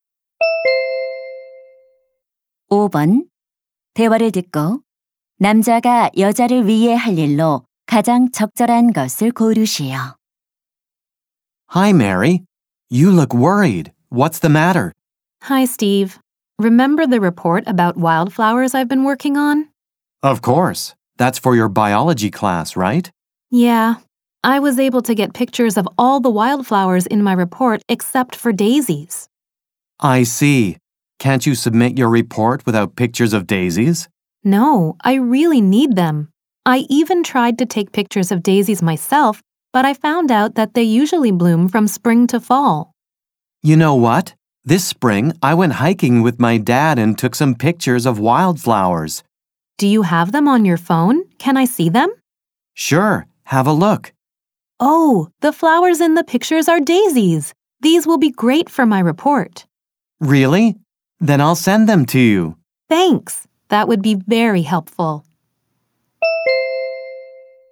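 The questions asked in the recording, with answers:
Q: 대화를 듣고 남자가 여자를 위해 할 일로 가장 적절한 것을 고르시오.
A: 데이지 사진 보내 주기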